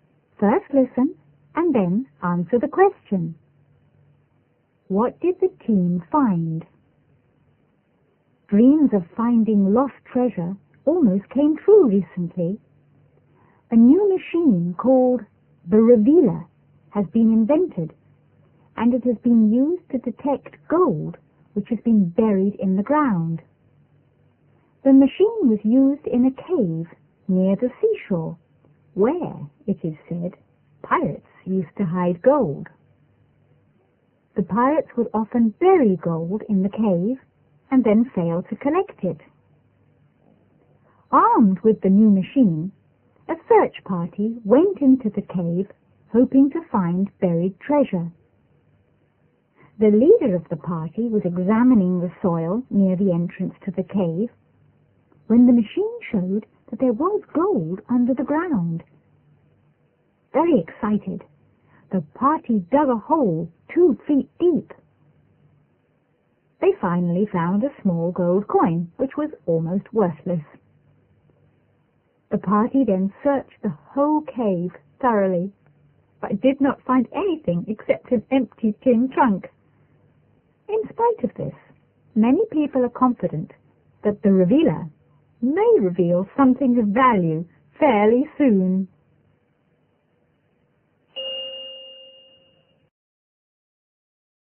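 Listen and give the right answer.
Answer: A small, almost worthless gold coin and an empty tin trunk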